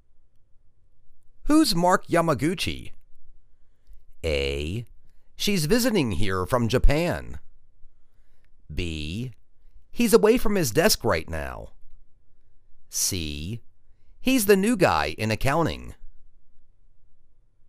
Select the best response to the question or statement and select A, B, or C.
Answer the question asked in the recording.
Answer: He's the new guy in accounting.